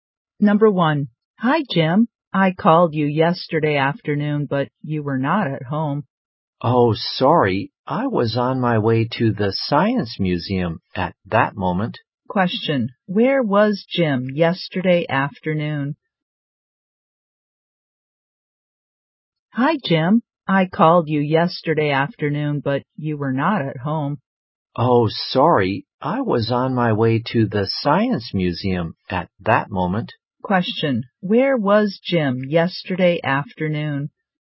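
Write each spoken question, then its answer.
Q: Where was Jim yesterday afternoon?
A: On his way to the Science Museum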